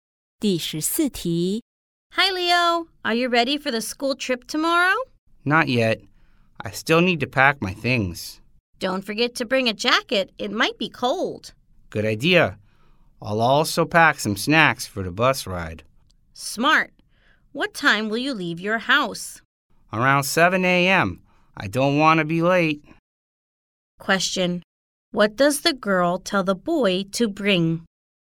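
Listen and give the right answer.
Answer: A jacket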